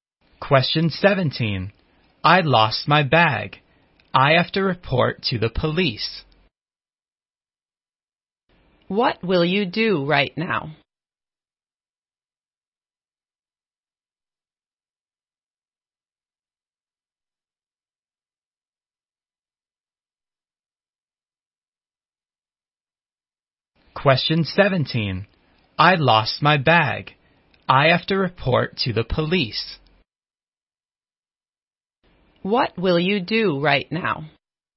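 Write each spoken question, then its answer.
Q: What will you do right now?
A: Report to the police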